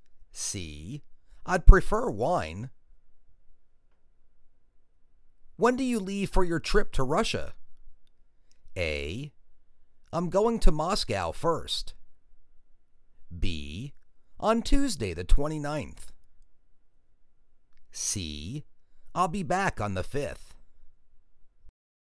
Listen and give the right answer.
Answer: On Tuesday the 29th.